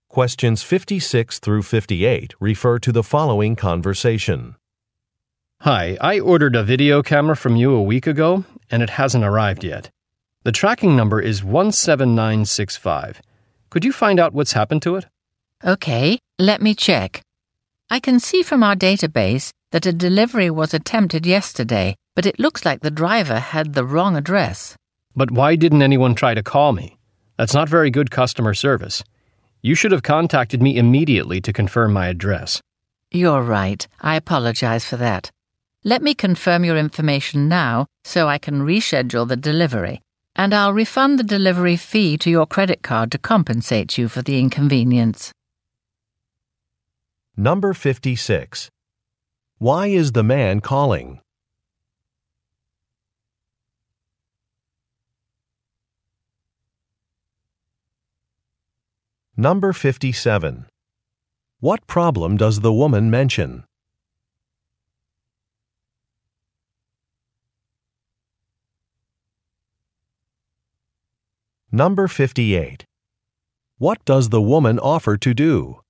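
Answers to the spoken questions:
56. To ask about a video camera order that hasn't arrived
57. The driver had the wrong address
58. Refund the delivery fee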